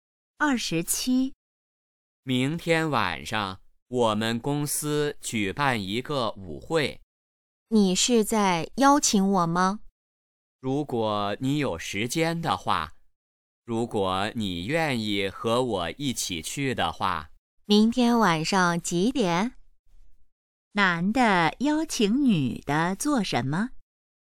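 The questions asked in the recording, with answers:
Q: 男的邀请女的做什么?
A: 参加公司舞会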